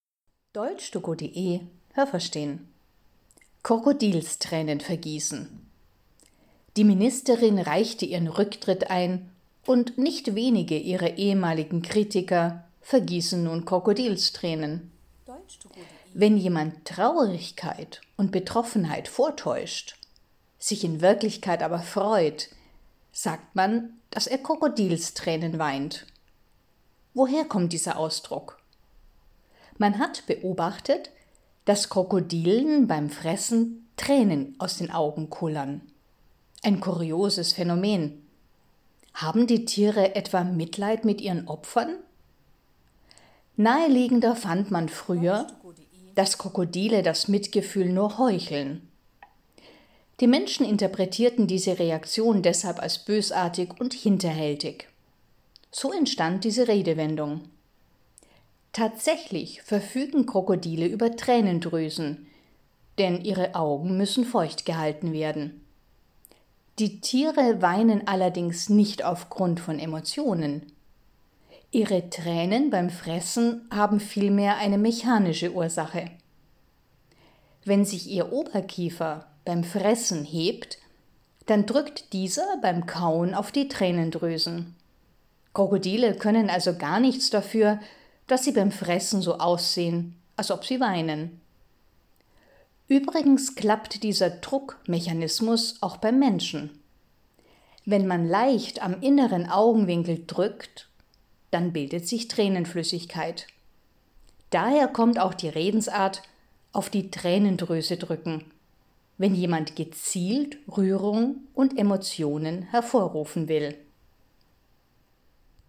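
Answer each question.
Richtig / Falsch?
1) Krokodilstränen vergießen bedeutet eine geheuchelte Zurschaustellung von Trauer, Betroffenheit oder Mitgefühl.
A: Richtig

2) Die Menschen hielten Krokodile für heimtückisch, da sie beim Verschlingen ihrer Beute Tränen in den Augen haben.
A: Richtig

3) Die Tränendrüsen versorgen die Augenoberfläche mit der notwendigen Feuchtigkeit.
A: Richtig

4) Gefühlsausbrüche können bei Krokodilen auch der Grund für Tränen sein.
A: Falsch

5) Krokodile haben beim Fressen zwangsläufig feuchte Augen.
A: Richtig

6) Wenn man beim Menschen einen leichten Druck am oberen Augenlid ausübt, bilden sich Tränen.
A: Falsch

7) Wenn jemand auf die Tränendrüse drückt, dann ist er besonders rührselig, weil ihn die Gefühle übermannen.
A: Falsch

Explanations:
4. Sie weinen nicht aufgrund von Emotionen.
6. Man muss einen leichten Druck am inneren Augenwinkel ausüben.
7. Jemand ist nicht von Gefühlen überwältigt, sondern setzt gezielt Emotionen ein, um etwas zu erreichen.

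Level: Hörtexte C (schwer)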